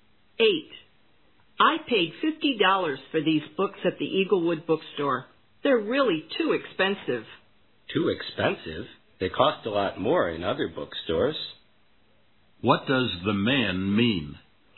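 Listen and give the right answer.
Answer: The books were actually cheap.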